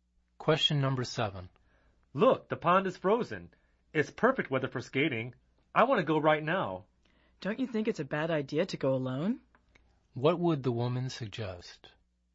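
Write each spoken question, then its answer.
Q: What would the woman suggest?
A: Not going skating alone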